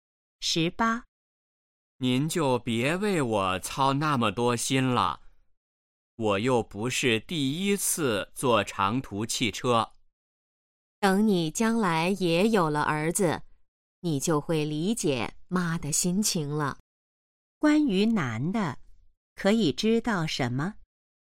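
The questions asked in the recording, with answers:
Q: 关于男的,可以知道什么?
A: 要坐长途汽车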